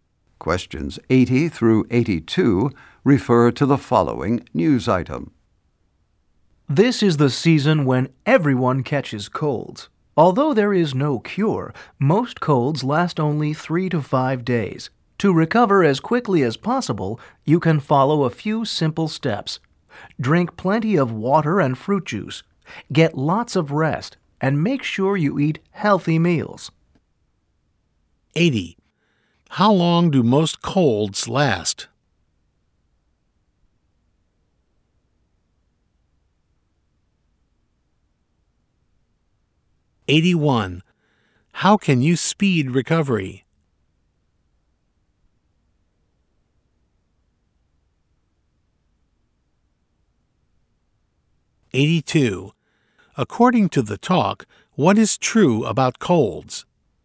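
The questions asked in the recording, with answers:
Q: How long do most colds last?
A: 3 to 5 days

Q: How can you speed recovery?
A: Drink plenty of water and juice, rest, and eat healthy meals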